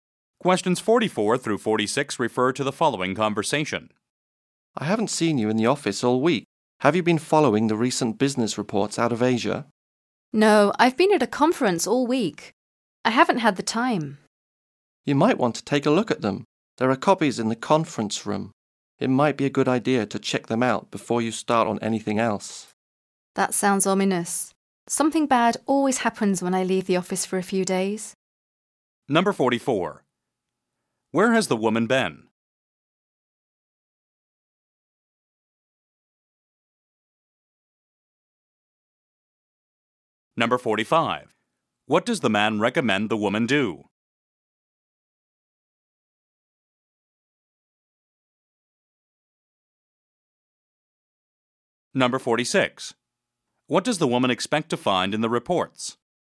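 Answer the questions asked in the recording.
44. At a conference
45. Read the business reports from Asia
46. Bad news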